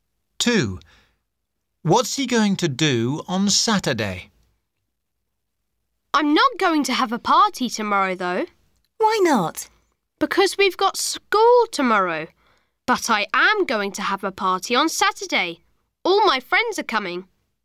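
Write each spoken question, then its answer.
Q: What's he going to do on Saturday?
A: Have a party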